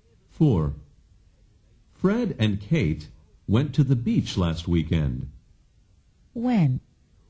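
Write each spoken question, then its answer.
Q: When?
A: Last weekend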